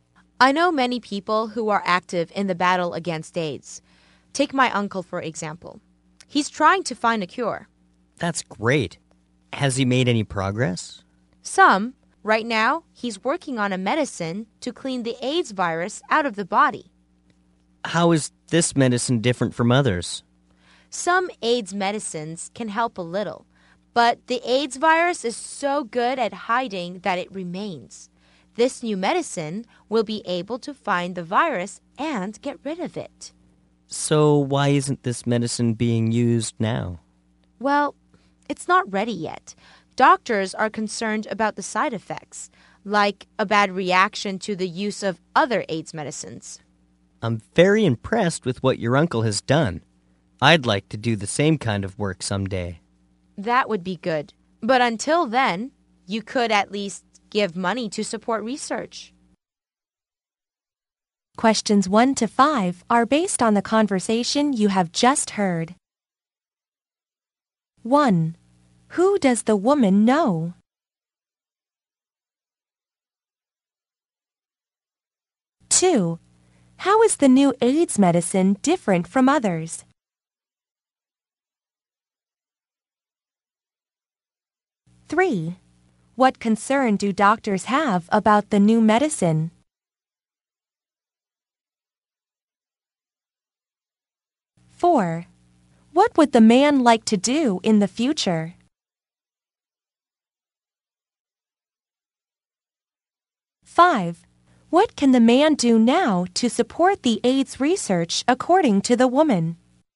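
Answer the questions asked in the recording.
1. Many people active in the battle against AIDS, such as her uncle who is trying to find a cure
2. It can find the hiding virus and get rid of it
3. Side effects, like a bad reaction with other AIDS medicines
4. The same kind of work as the uncle, finding a cure for AIDS
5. Give money to support research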